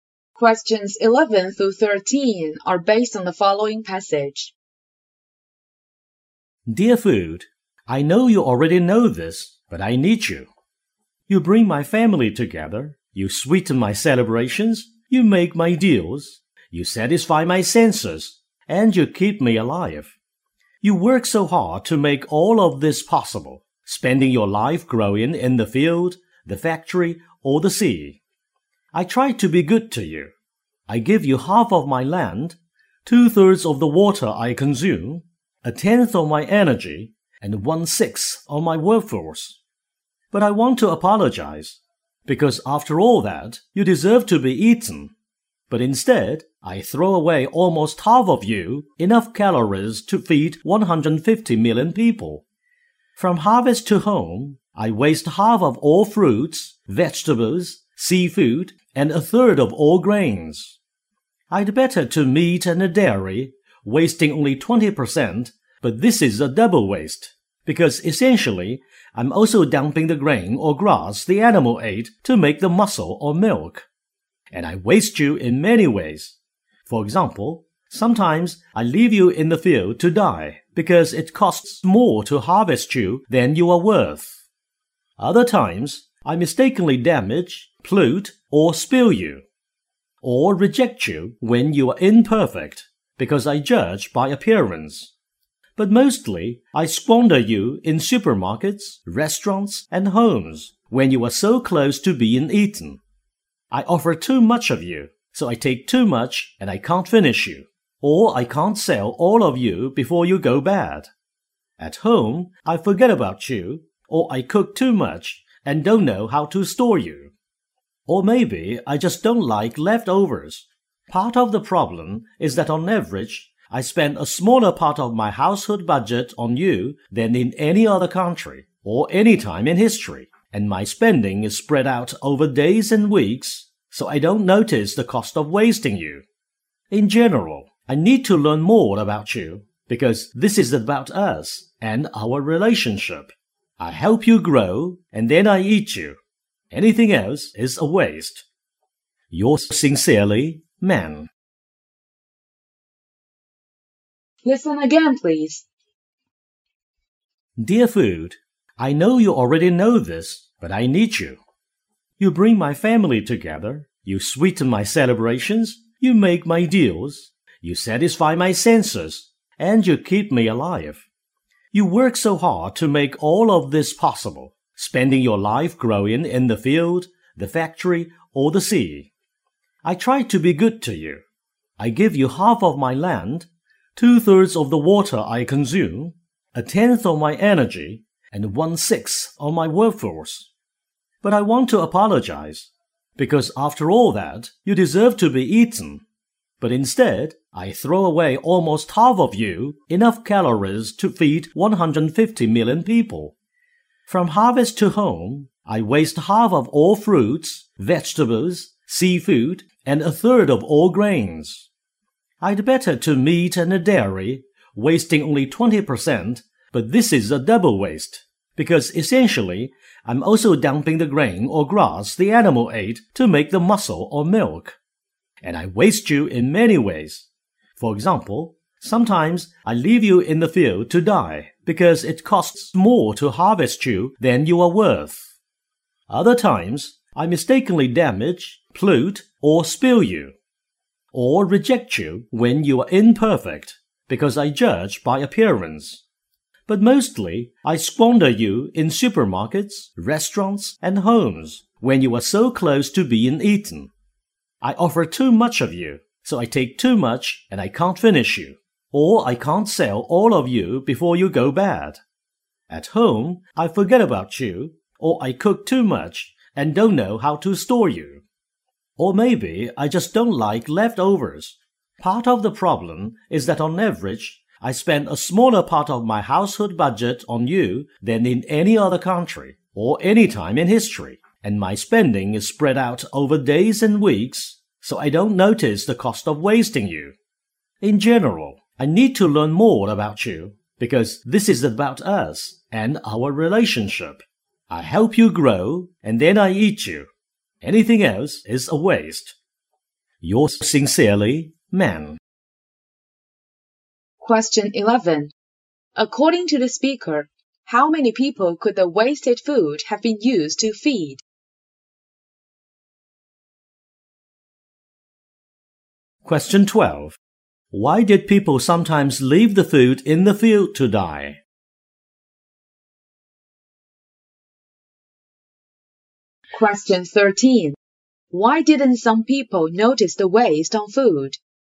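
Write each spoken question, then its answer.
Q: According to the speaker, how many people could the wasted food have been used to feed?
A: 150 million

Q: Why did people sometimes leave the food in the field to die?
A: It costs more to harvest it than it is worth

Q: Why didn't some people notice the waste on food?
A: They spend a small part of their budget on food, spread over days and weeks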